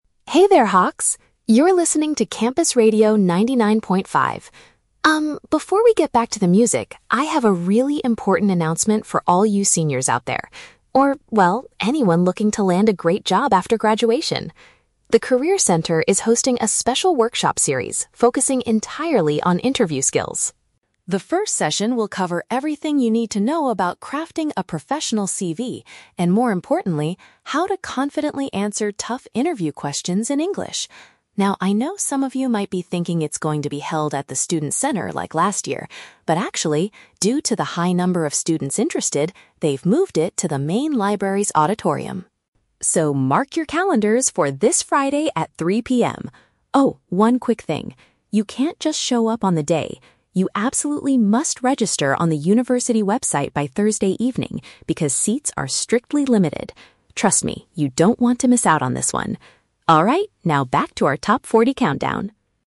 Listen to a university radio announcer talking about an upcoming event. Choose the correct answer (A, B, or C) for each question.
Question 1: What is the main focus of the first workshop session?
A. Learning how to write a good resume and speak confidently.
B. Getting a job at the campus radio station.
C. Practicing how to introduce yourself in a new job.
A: A

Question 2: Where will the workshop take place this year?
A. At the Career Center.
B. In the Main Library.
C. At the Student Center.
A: B

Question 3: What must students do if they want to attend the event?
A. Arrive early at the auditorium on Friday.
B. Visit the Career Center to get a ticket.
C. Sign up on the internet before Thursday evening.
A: C

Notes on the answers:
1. The speaker mentions that the session will cover "crafting a professional CV" and how to "confidently answer tough interview questions". "CV" is paraphrased as "resume" in the correct option.
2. The speaker clearly states that they moved the event to the "Main Library's auditorium".
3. The speaker says you "must register on the university website by Thursday evening." "Register on the website" is paraphrased as "sign up on the internet".

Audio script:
Speaker: Hey there, Hawks! You're listening to Campus Radio 99.5. Um, before we get back to the music, I have a really important announcement for all you seniors out there, or well, anyone looking to land a great job after graduation. The Career Center is hosting a special workshop series focusing entirely on interview skills.
The first session will cover everything you need to know about crafting a professional CV, and more importantly, how to confidently answer tough interview questions in English. Now, I know some of you might be thinking it's going to be held at the Student Center like last year. But, actually, due to the high number of students interested, they've moved it to the Main Library's auditorium.
So, mark your calendars for this Friday at 3:00 PM. Oh, one quick thing—you can't just show up on the day. You absolutely must register on the university website by Thursday evening because seats are strictly limited. Trust me, you don't want to miss out on this one. Alright, now back to our top 40 countdown...

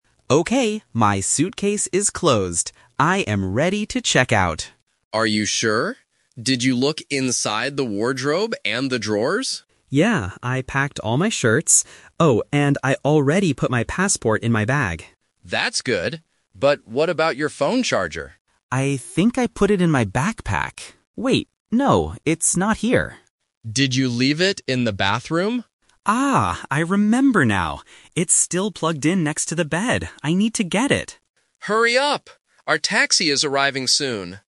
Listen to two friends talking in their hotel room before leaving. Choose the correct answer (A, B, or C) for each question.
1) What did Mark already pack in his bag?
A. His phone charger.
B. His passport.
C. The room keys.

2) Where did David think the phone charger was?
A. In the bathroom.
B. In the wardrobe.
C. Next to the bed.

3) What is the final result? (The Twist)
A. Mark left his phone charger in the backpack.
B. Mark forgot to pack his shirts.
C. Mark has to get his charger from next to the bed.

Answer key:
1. B
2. A
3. C

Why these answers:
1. Mark clearly states, "I already put my passport in my bag."
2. When Mark cannot find his charger, David asks, "Did you leave it in the bathroom?"
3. This is the Twist. Mark realizes his mistake and says, "It's still plugged in next to the bed. I need to get it."

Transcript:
Mark: Okay, my suitcase is closed. I am ready to check out!
David: Are you sure? Did you look inside the wardrobe and the drawers?
Mark: Yeah, I packed all my shirts. Oh, and I already put my passport in my bag.
David: That's good. But what about your phone charger?
Mark: I think I put it in my backpack. Wait... no, it's not here.
David: Did you leave it in the bathroom?
Mark: Ah, I remember now! It's still plugged in next to the bed. I need to get it.

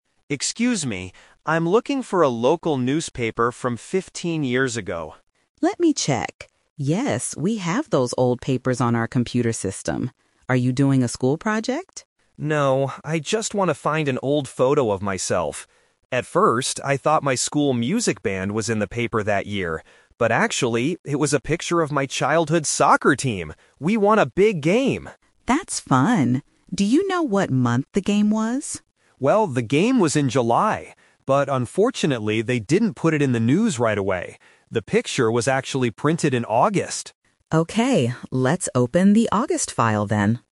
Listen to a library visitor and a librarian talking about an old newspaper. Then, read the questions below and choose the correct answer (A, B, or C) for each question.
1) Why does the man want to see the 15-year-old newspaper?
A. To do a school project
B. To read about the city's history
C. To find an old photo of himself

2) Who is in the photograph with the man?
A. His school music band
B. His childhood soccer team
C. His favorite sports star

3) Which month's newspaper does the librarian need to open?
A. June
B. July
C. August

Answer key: 1C, 2B, 3C

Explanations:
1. The visitor clearly says, "No, I just want to find an old photo of myself." Option (A) is a trap; the librarian asks if he is doing a school project, but he says "No." Option (B) is a plausible reason to read an old newspaper, but it is never mentioned in the audio.
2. The visitor explains the twist by saying, "...actually, it was a picture of my childhood soccer team!" Option (A) is a trap; he thought the picture was of his music band at first, but he was wrong. Option (C) is a plausible guess for a newspaper photo, but it is not mentioned.
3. The visitor says, "The picture was actually printed in August." Option (B) is a trap; the game happened in July, but the newspaper picture was not printed in that month. Option (A) is a common month but is never mentioned in the conversation.

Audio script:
Visitor: Excuse me. I'm looking for a local newspaper from fifteen years ago.
Librarian: Let me check. Yes, we have those old papers on our computer system. Are you doing a school project?
Visitor: No, I just want to find an old photo of myself. At first, I thought my school music band was in the paper that year. But actually, it was a picture of my childhood soccer team! We won a big game.
Librarian: That's fun! Do you know what month the game was?
Visitor: Well, the game was in July. But unfortunately, they didn't put it in the news right away. The picture was actually printed in August.

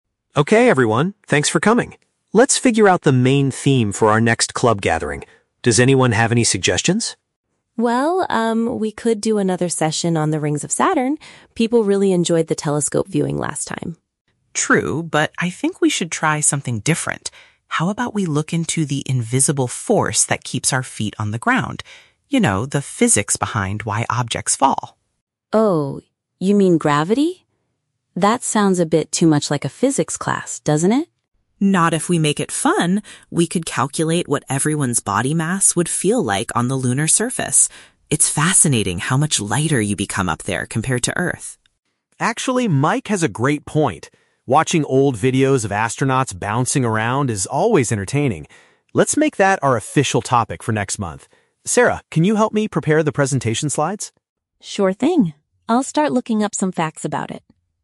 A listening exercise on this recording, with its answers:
Listen to the conversation between the club president and the members. Choose the correct answer (A, B, or C) for each question.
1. What topic does Sarah initially suggest for the next meeting?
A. Discussing the rings around a specific planet.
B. Calculating body mass on different planets.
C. Building a new telescope for the club.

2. What is the main focus of Mike's proposal?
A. The history of astronauts landing on the Moon.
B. The natural force that pulls objects toward the ground.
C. The differences between Earth's climate and the Moon's.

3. What is the club's final decision for the upcoming gathering?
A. To ask a science teacher to give a guest lecture.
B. To focus the session on how weight changes in space.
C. To watch a documentary about the rings of Saturn.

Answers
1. A
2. B
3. B

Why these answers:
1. Sarah suggests doing another session on the "rings of Saturn" (a specific planet). Option (B) is The Trap: Mike is the one who suggests calculating body mass, not Sarah. Option (C) is plausible because she mentions "telescope viewing", but she never suggests building one.
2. Mike proposes looking into "the invisible force that keeps our feet on the ground" and "gravity." This is a paraphrase for the natural force that pulls objects down. Option (A) is The Trap: David mentions watching old videos of astronauts, but that is to support Mike's idea about gravity, not the main focus of the proposal itself. Option (C) is not mentioned.
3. The club decides to go with Mike's idea about gravity and how "body mass would feel like on the lunar surface" (how weight changes in space). Option (A) is The Trap: Sarah says the topic sounds like a "physics class," but they do not decide to invite a teacher. Option (C) is incorrect because they rejected the idea about Saturn.

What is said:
David: Okay everyone, thanks for coming. Let's figure out the main theme for our next club gathering. Does anyone have any suggestions?
Sarah: Well, um, we could do another session on the rings of Saturn. People really enjoyed the telescope viewing last time.
Mike: True, but I think we should try something different. How about we look into the invisible force that keeps our feet on the ground? You know, the physics behind why objects fall.
Sarah: Oh, you mean gravity? That sounds a bit too much like a physics class, doesn't it?
Mike: Not if we make it fun! We could calculate what everyone's body mass would feel like on the lunar surface. It's fascinating how much lighter you become up there compared to Earth.
David: Actually, Mike has a great point. Watching old videos of astronauts bouncing around is always entertaining. Let's make that our official topic for next month. Sarah, can you help me prepare the presentation slides?

